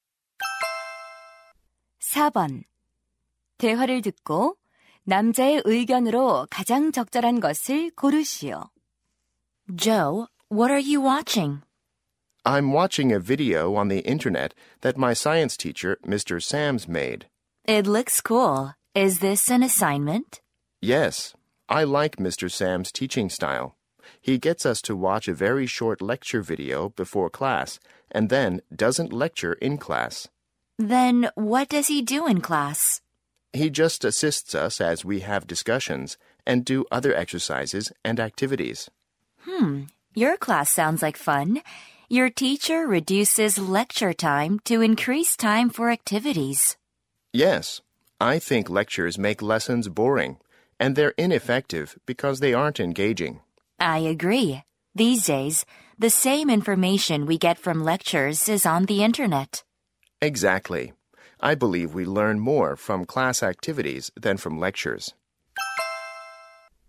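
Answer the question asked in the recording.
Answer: 강의보다 수업 활동을 통해 더 많이 배운다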